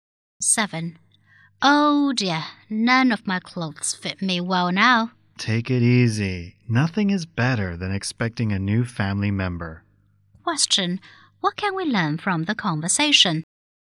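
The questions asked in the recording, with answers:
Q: What can we learn from the conversation?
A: The woman is pregnant.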